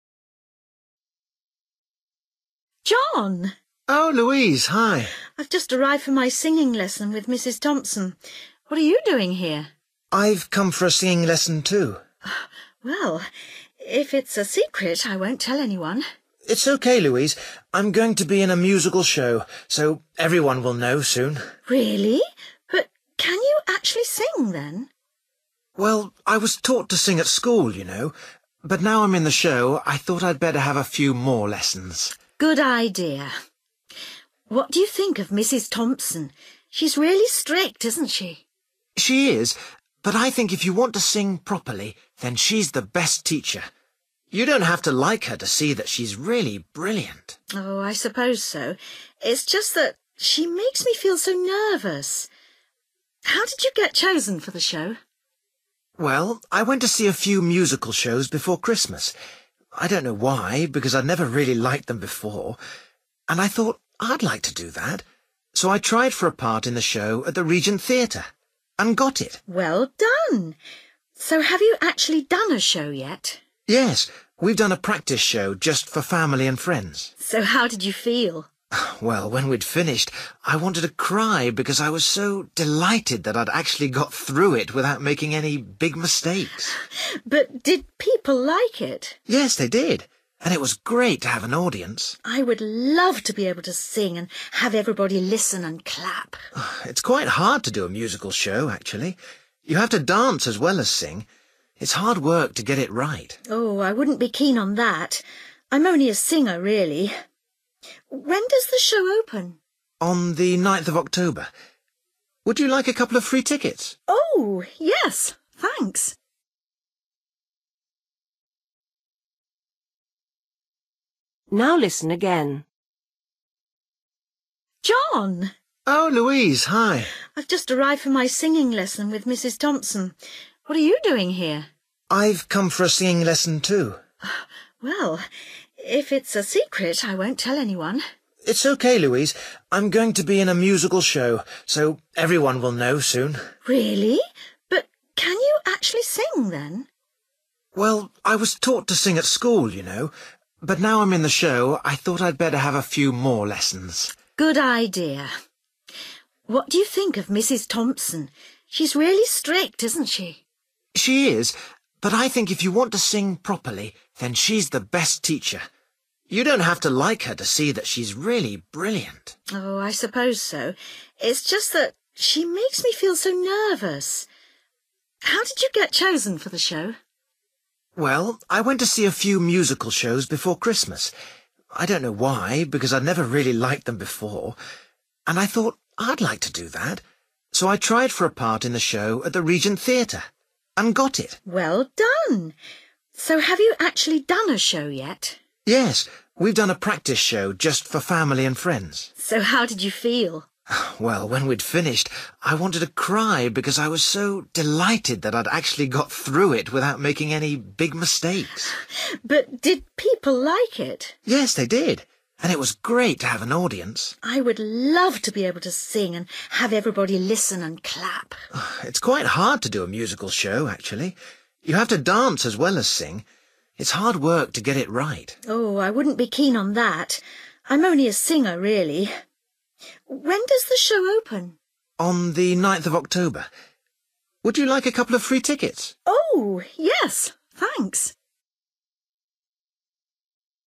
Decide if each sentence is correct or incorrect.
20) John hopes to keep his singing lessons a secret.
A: NO

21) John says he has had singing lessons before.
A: YES

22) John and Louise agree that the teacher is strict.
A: YES

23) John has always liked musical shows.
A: NO

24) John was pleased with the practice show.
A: YES

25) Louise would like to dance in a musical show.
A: NO

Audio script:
Louise: John.
John: Oh Louise. Hi.
Louise: I've just arrived for my singing lesson with Mrs Thompson. What are you doing here?
John: I've come for a singing lesson too.
Louise: Well, if it's a secret I won't tell anyone.
John: It's OK, Louise, I'm going to be in a musical show, so everyone will know soon.
Louise: Really! But can you actually sing then?
John: Well, I was taught to sing at school you know, but now I'm in the show I thought I'd better have a few more lessons.
Louise: Good idea. What do you think of Mrs Thompson? She's really strict, isn't she?
John: She is, but I think if you want to sing properly, then she's the best teacher. You don't have to like her to see that she's really brilliant.
Louise: Oh, I suppose so, it's just that she makes me feel so nervous. How did you get chosen for the show?
John: Well, I went to see a few musical shows before Christmas. I don't know why, because I'd never really liked them before, and I thought I'd like to do that so I tried for a part in the show at The Regent Theatre and got it.
Louise: Well done ... so have you actually done a show yet?
John: Yes, we've done a practice show just for family and friends.
Louise: So, how did you feel?
John: Well, when we'd finished I wanted to cry because I was so delighted that I'd actually got through it without making any big mistakes.
Louise: But did people like it?
John: Yes they did, and it was great to have an audience.
Louise: I would love to be able to sing and have everybody listen and clap.
John: It's quite hard to do a musical show, actually. You have to dance as well as sing. It's hard work to get it right.
Louise: Oh, I wouldn't be keen on that. I'm only a singer really. When does the show open?
John: On the 9th of October. Would you like a couple of free tickets?
Louise: Oh yes! Thanks!

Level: B1